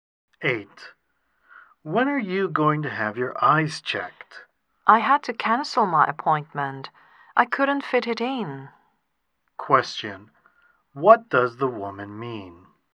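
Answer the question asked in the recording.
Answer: She was too busy to have her eyes checked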